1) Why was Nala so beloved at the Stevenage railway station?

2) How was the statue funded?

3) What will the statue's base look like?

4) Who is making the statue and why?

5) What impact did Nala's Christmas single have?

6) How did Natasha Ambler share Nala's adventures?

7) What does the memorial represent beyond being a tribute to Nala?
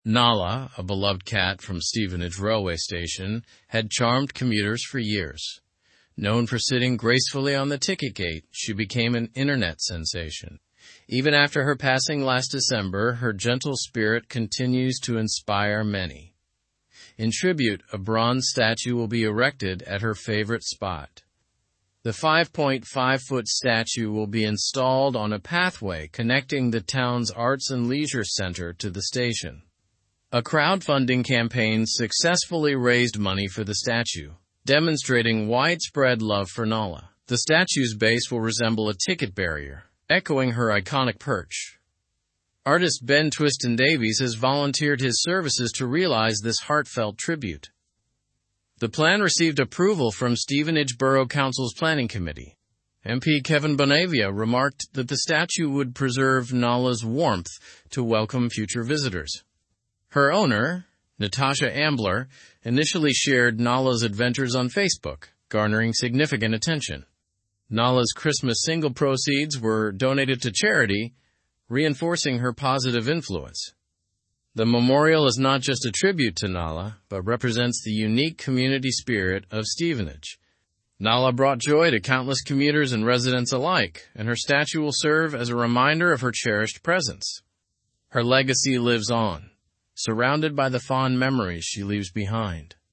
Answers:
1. Nala charmed commuters by sitting gracefully on the ticket gate and became an internet sensation.
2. The statue was funded through a crowdfunding campaign.
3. The statue's base will resemble a ticket barrier.
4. Artist Ben Twiston-Davies is making the statue voluntarily as a tribute to Nala.
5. The proceeds from Nala's Christmas single were donated to charity.
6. Natasha Ambler shared Nala's adventures on Facebook.
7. The memorial represents the unique community spirit of Stevenage.

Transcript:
Nala, a beloved cat from Stevenage railway station, had charmed commuters for years. Known for sitting gracefully on the ticket gate, she became an internet sensation. Even after her passing last December, her gentle spirit continues to inspire many. In tribute, a bronze statue will be erected at her favorite spot.
The 5.5-foot statue will be installed on a pathway connecting the town's Arts and Leisure Centre to the station. A crowdfunding campaign successfully raised money for the statue, demonstrating widespread love for Nala. The statue's base will resemble a ticket barrier, echoing her iconic perch. Artist Ben Twiston-Davies has volunteered his services to realize this heartfelt tribute.
The plan received approval from Stevenage Borough Council's planning committee. MP Kevin Bonavia remarked that the statue would preserve Nala's warmth to welcome future visitors. Her owner, Natasha Ambler, initially shared Nala's adventures on Facebook, garnering significant attention. Nala's Christmas single proceeds were donated to charity, reinforcing her positive influence.
The memorial is not just a tribute to Nala but represents the unique community spirit of Stevenage. Nala brought joy to countless commuters and residents alike, and her statue will serve as a reminder of her cherished presence. Her legacy lives on, surrounded by the fond memories she leaves behind.

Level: Level 3